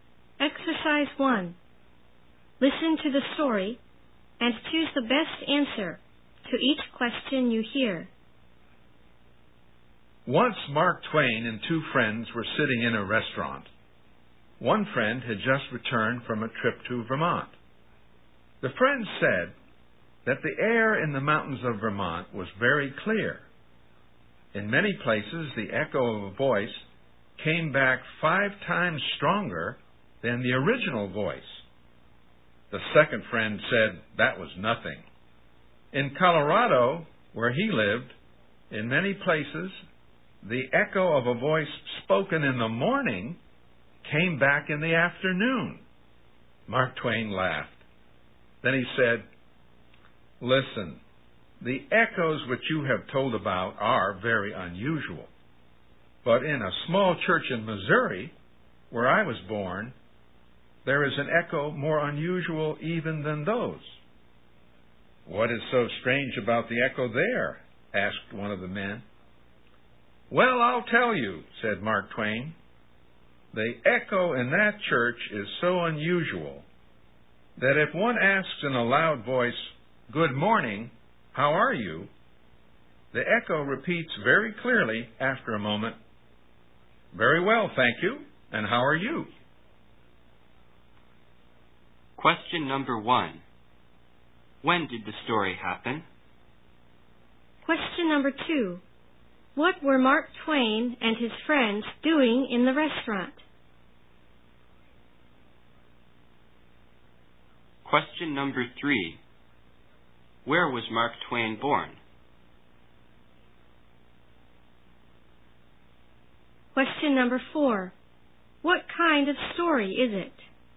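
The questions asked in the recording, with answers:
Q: What were Mark Twain and his friends doing in the restaurant?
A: Talking about unusual echoes

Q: Where was Mark Twain born?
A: In Missouri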